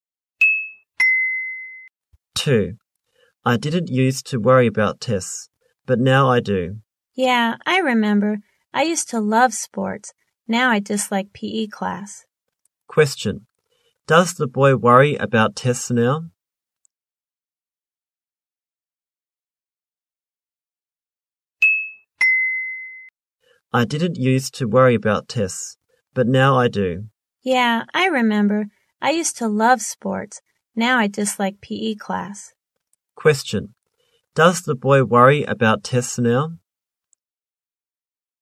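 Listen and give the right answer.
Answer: Yes, he does.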